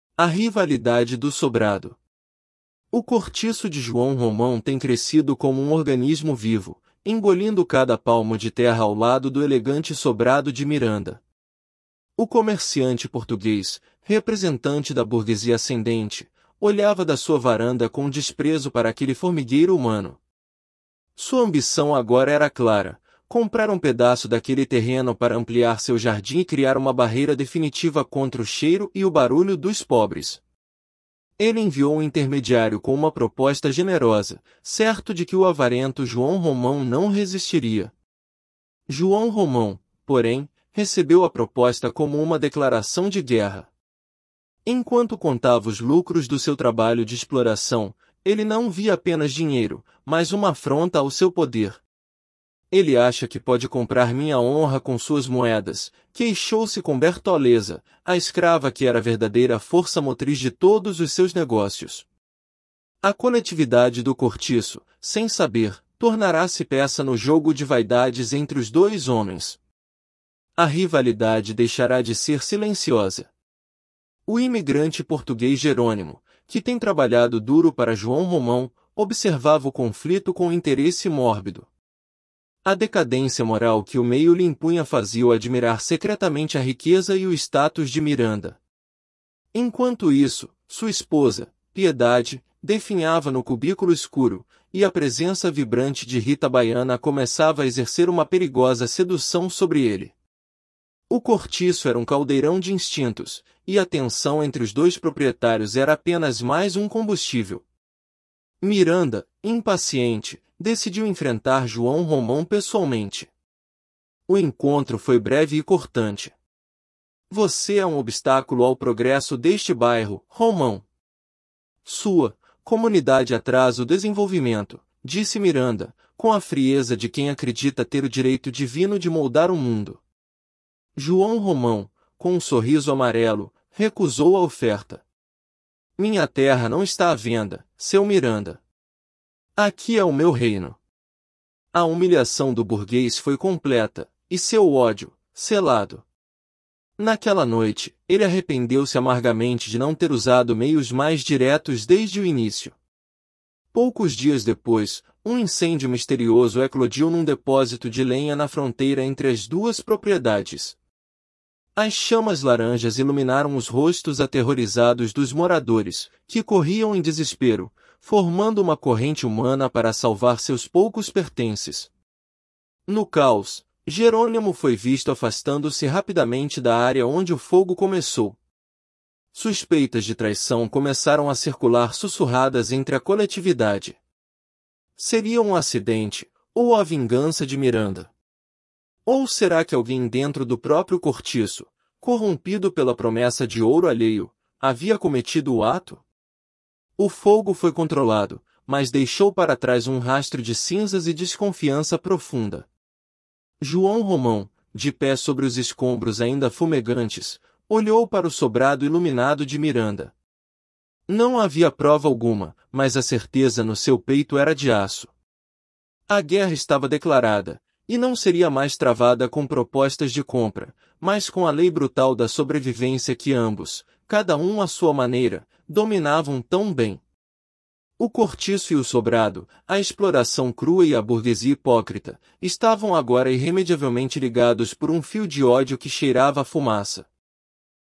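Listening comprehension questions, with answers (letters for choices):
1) Miranda olhava para o cortiço da sua varanda com admiração e compaixão. (Resposta)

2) João Romão aceitou a proposta generosa de Miranda para vender parte do terreno. (Resposta)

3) Jerônimo é um imigrante português que trabalha duro para João Romão. (Resposta)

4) Piedade, esposa de Jerônimo, prosperava e era feliz no cortiço. (Resposta)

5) O incêndio no depósito de lenha foi claramente um acidente natural. (Resposta)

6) No final, João Romão tem certeza de que a guerra com Miranda será travada com a lei brutal da sobrevivência. (Resposta)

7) O que Miranda representa na história? (Resposta)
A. A burguesia ascendente e hipócrita.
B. A classe trabalhadora imigrante.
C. O poder religioso da época.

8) Como João Romão descreve o cortiço durante o confronto com Miranda? (Resposta)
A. Como um obstáculo ao progresso.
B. 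Como o seu reino.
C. Como uma comunidade atrasada.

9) Qual personagem começa a exercer uma perigosa sedução sobre Jerônimo? (Resposta)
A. Piedade, sua esposa.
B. Bertoleza, a escrava.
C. Rita Baiana, uma moradora.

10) Qual foi a reação de Miranda após a recusa de João Romão? (Resposta)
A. Sentiu-se aliviado por não ter gasto seu dinheiro.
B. Arrependeu-se amargamente de não ter usado meios mais diretos.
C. Decidiu mudar-se para outro bairro.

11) O que as suspeitas sobre o incêndio revelam sobre a coletividade do cortiço? (Resposta)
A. Sua união inabalável em momentos de crise.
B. A corrupção e desconfiança que o meio pode gerar.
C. A falta de interesse pelos conflitos dos proprietários.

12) Qual é o tema central da rivalidade entre João Romão e Miranda? (Resposta)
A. Uma disputa religiosa.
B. Um conflito de vaidades e poder entre exploração crua e burguesia hipócrita.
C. Uma competição comercial justa.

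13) Como o narrador descreve o crescimento do cortiço de João Romão? (Resposta)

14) Qual era o principal objetivo de Miranda ao tentar comprar o terreno de João Romão? (Resposta)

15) Por que João Romão interpretou a proposta de compra de Miranda como uma declaração de guerra? (Resposta)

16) Qual é o papel de Bertoleza nos negócios de João Romão? (Resposta)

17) Como Jerônimo se sente em relação à riqueza e ao status de Miranda? (Resposta)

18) Qual foi a consequência imediata do incêndio no cortiço, além dos danos materiais? (Resposta)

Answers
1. Falso
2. Falso
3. Verdadeiro
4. Falso
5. Falso
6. Verdadeiro
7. A
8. B
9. C
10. B
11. B
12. B
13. Como um organismo vivo, engolindo cada palmo de terra ao lado do sobrado de Miranda.
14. Ampliar seu jardim e criar uma barreira contra o cheiro e o barulho dos pobres.
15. Porque viu nela uma afronta ao seu poder; Miranda achava que podia comprar sua honra com moedas.
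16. É a escrava que era a verdadeira força motriz de todos os seus negócios.
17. Admira-os secretamente.
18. Suspeitas de traição e uma desconfiança profunda entre os moradores.

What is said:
Episódio 3: A Rivalidade do Sobrado – TEST
O cortiço de João Romão tem crescido como um organismo vivo, engolindo cada palmo de terra ao lado do elegante sobrado de Miranda. O comerciante português, representante da burguesia ascendente, olhava da sua varanda com desprezo para aquele formigueiro humano. Sua ambição agora era clara: comprar um pedaço daquele terreno para ampliar seu jardim e criar uma barreira definitiva contra o cheiro e o barulho dos pobres. Ele enviou um intermediário com uma proposta generosa, certo de que o avarento João Romão não resistiria.
João Romão, porém, recebeu a proposta como uma declaração de guerra. Enquanto contava os lucros do seu trabalho de exploração, ele não via apenas dinheiro, mas uma afronta ao seu poder. 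'Ele acha que pode comprar minha honra com suas moedas?', queixou-se com Bertoleza, a escrava que era a verdadeira força motriz de todos os seus negócios. A coletividade do cortiço, sem saber, tornara-se peça no jogo de vaidades entre os dois homens. A rivalidade deixara de ser silenciosa.
O imigrante português Jerônimo, que tem trabalhado duro para João Romão, observava o conflito com interesse mórbido. A decadência moral que o meio lhe impunha fazia-o admirar secretamente a riqueza e o status de Miranda. Enquanto isso, sua esposa, Piedade, definhava no cubículo escuro, e a presença vibrante de Rita Baiana começava a exercer uma perigosa sedução sobre ele. O cortiço era um caldeirão de instintos, e a tensão entre os dois proprietários era apenas mais um combustível.
Miranda, impaciente, decidiu enfrentar João Romão pessoalmente. O encontro foi breve e cortante. 'Você é um obstáculo ao progresso deste bairro, Romão. 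Sua... comunidade atrasa o desenvolvimento', disse Miranda, com a frieza de quem acredita ter o direito divino de moldar o mundo. João Romão, com um sorriso amarelo, recusou a oferta. 'Minha terra não está à venda, seu Miranda. Aqui é o meu reino.' A humilhação do burguês foi completa, e seu ódio, selado. Naquela noite, ele arrependeu-se amargamente de não ter usado meios mais diretos desde o início.
Poucos dias depois, um incêndio misterioso eclodiu num depósito de lenha na fronteira entre as duas propriedades. As chamas laranjas iluminaram os rostos aterrorizados dos moradores, que corriam em desespero, formando uma corrente humana para salvar seus poucos pertences. No caos, Jerônimo foi visto afastando-se rapidamente da área onde o fogo começou. Suspeitas de traição começaram a circular sussurradas entre a coletividade. Seria um acidente, ou a vingança de Miranda? Ou será que alguém dentro do próprio cortiço, corrompido pela promessa de ouro alheio, havia cometido o ato?
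O fogo foi controlado, mas deixou para trás um rastro de cinzas e desconfiança profunda. João Romão, de pé sobre os escombros ainda fumegantes, olhou para o sobrado iluminado de Miranda. Não havia prova alguma, mas a certeza no seu peito era de aço. A guerra estava declarada, e não seria mais travada com propostas de compra, mas com a lei brutal da sobrevivência que ambos, cada um à sua maneira, dominavam tão bem. O cortiço e o sobrado, a exploração crua e a burguesia hipócrita, estavam agora irremediavelmente ligados por um fio de ódio que cheirava a fumaça.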